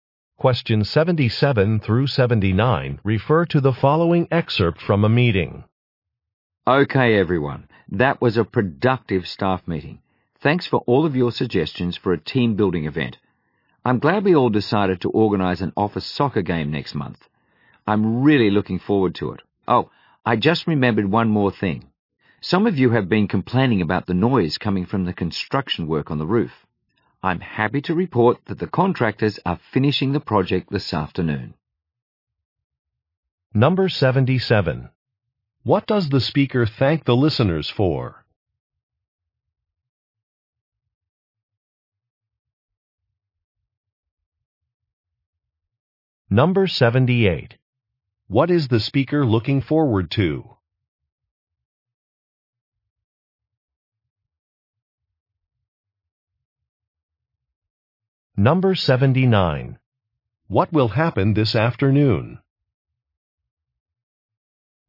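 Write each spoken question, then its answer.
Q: What does the speaker thank the listeners for?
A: Their suggestions for a team-building event

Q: What is the speaker looking forward to?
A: An office soccer game

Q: What will happen this afternoon?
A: The roof construction work will be finished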